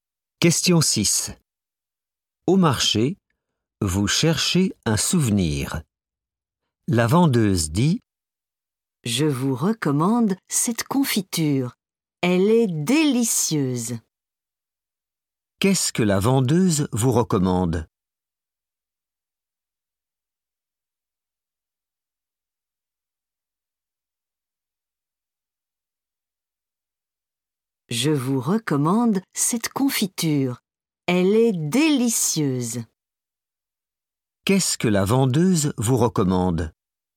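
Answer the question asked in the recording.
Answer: de la confiture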